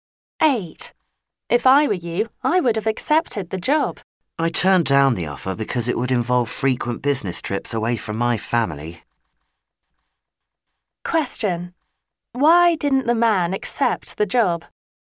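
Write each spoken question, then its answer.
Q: Why didn't the man accept the job?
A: It would involve frequent business trips away from his family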